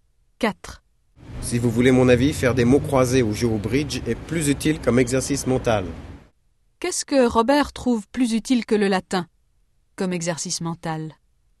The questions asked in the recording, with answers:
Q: Qu'est-ce que Robert trouve plus utile que le latin comme exercice mental?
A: Les mots croisés.